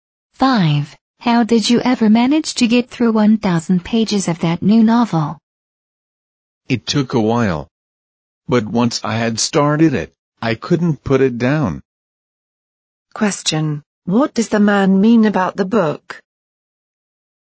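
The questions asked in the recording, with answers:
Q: What does the man mean about the book?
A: The book was so interesting he couldn't stop reading it.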